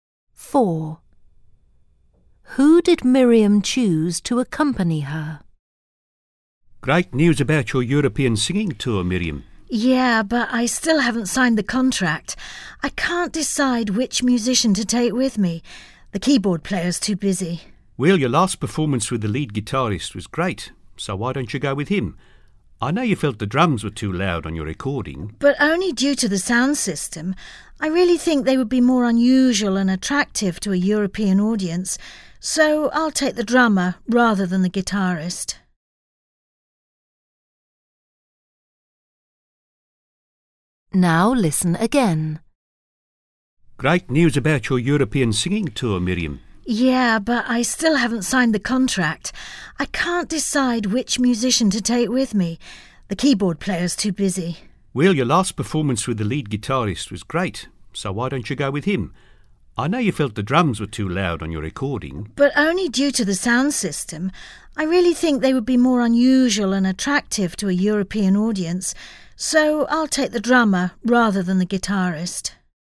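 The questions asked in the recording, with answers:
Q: Who did Miriam choose to accompany her?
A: The drummer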